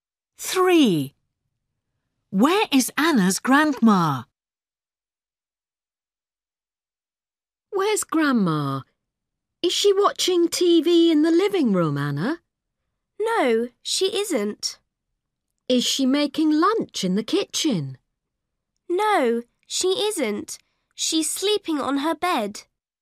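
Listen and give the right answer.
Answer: on her bed, sleeping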